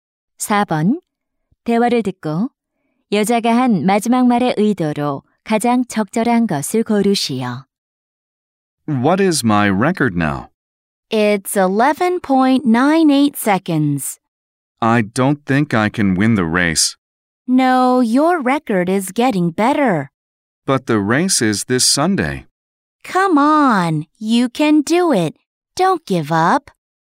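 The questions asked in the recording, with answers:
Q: 대화를 듣고 여자가 한 마지막 말의 의도로 가장 적절한 것을 고르시오.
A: 격려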